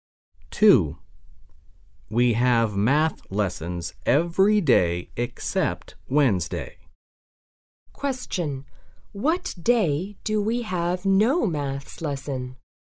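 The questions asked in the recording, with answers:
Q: What day do we have no maths lesson?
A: Wednesday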